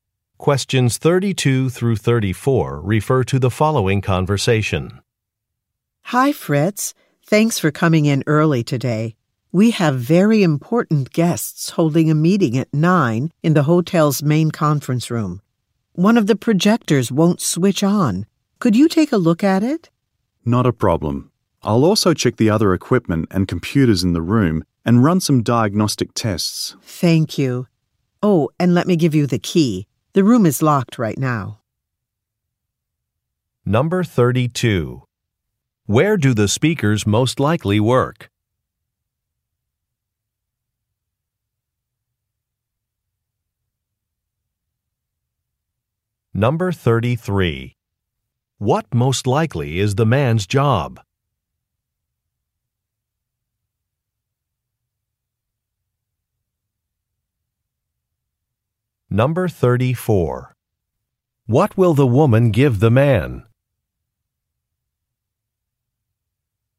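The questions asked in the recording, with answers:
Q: Where do the speakers most likely work?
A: At a hotel

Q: What most likely is the man's job?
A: Technician (equipment/IT)

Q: What will the woman give the man?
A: A key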